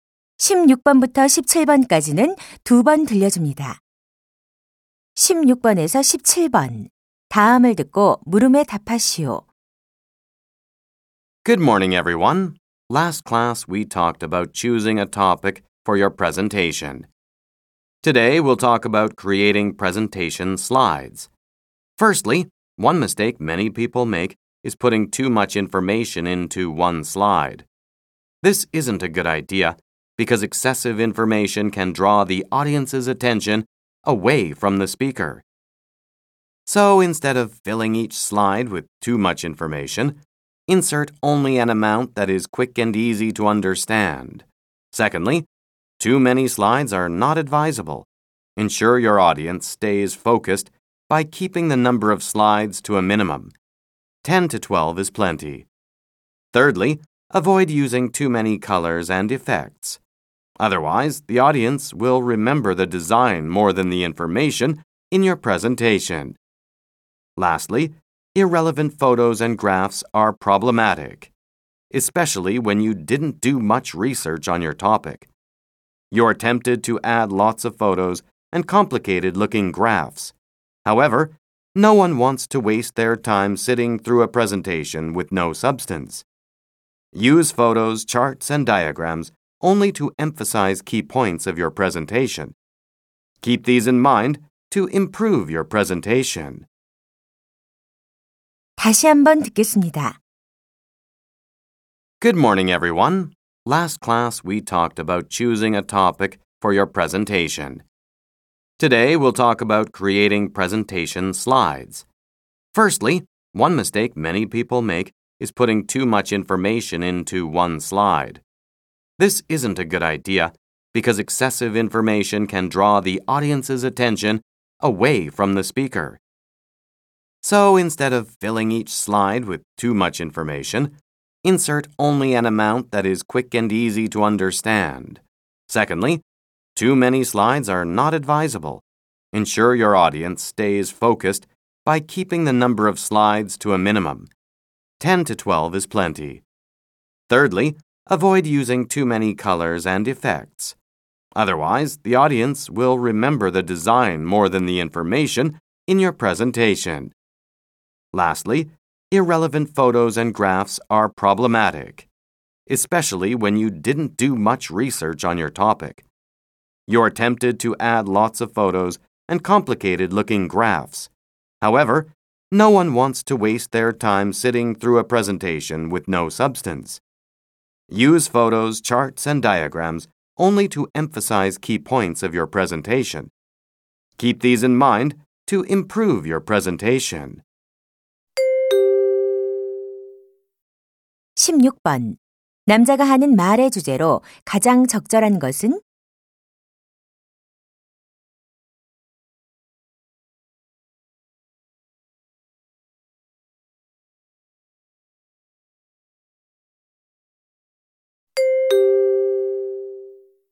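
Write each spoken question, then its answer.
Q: 남자가 하는 말의 주제로 가장 적절한 것은?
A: 효과적인 프레젠테이션 슬라이드 만드는 방법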